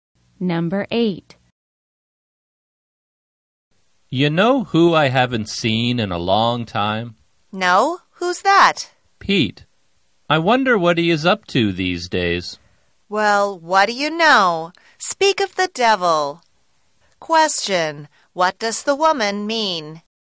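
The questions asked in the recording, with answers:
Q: What does the woman mean?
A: Pete has just shown up as they were talking about him.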